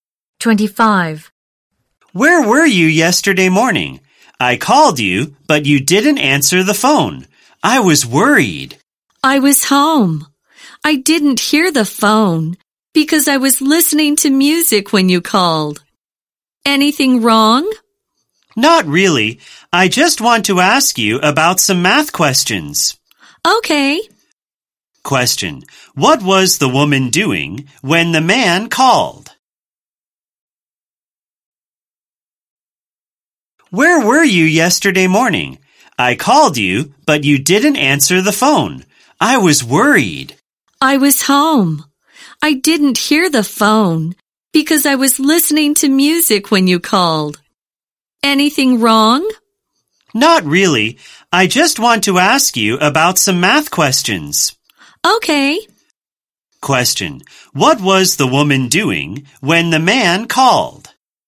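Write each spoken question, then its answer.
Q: Question, what was the woman doing when the man called?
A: She was listening to music.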